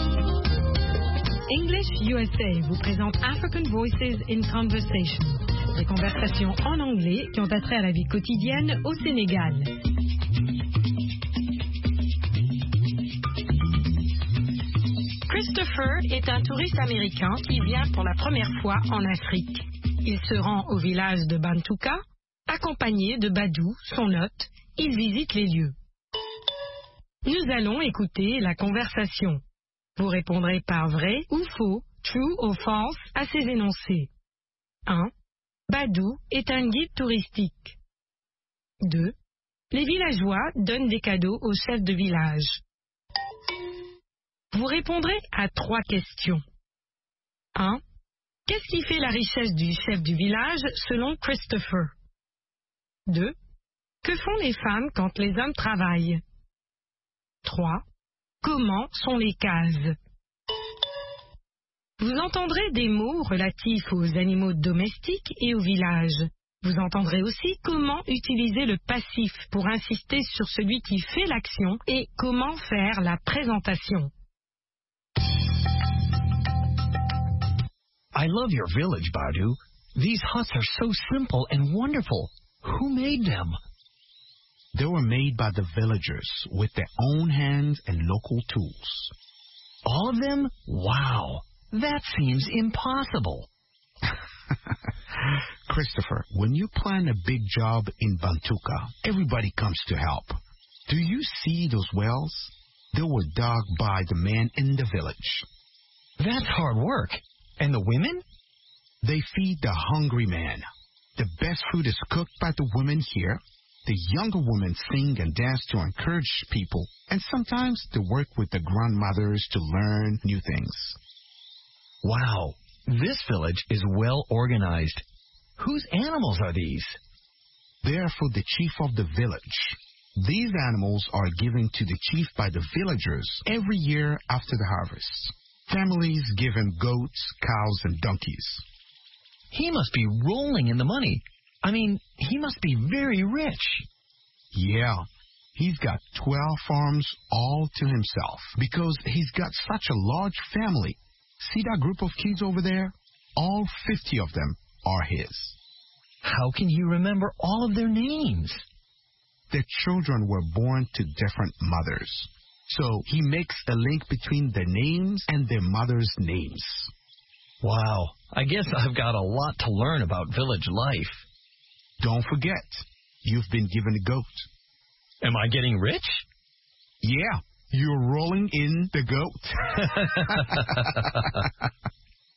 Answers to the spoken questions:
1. L'énoncé 1 est faux.
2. L'énoncé 2 est vrai.
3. Ses ânes, ses vaches et ses chèvres.
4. Elles cuisinent.
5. Elles sont simples et formidables.